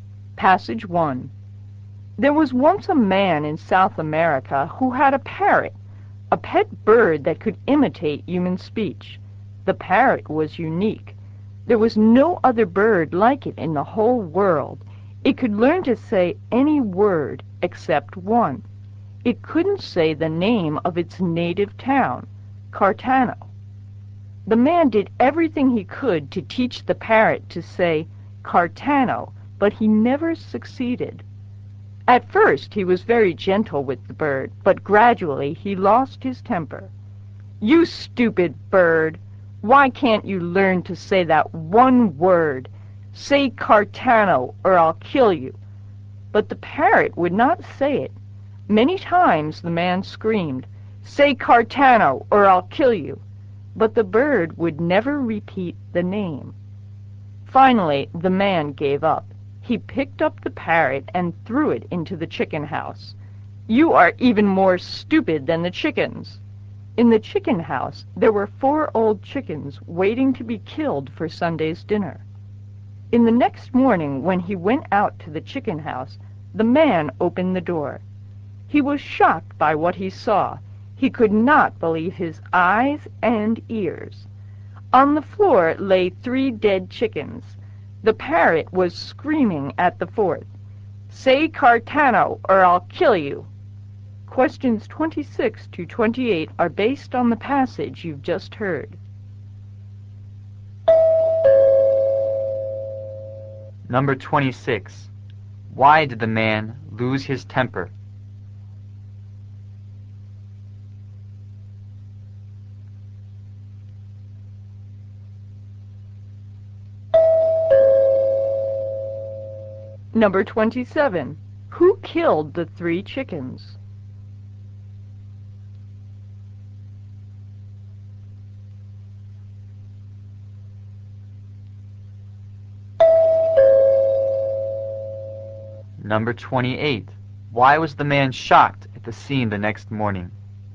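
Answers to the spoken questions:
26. The parrot couldn't say Cartano
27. The parrot
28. The parrot had killed three chickens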